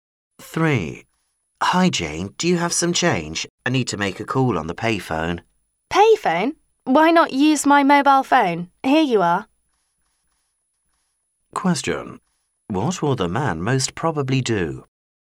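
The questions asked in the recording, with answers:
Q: What will the man most probably do?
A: Use Jane's mobile phone to make the call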